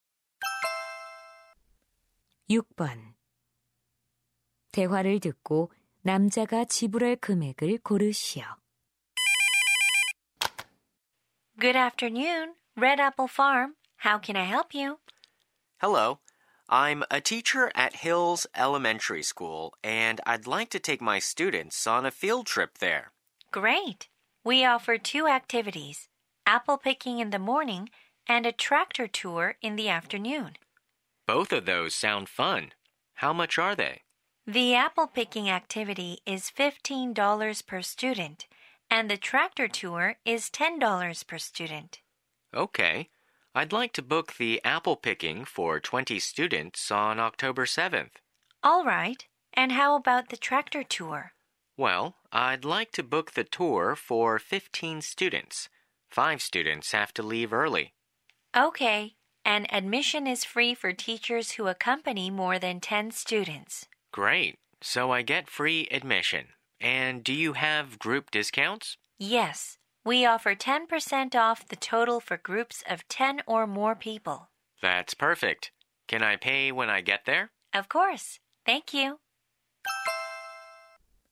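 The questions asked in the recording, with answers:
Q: 대화를 듣고 남자가 지불할 금액을 고르시오.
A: $405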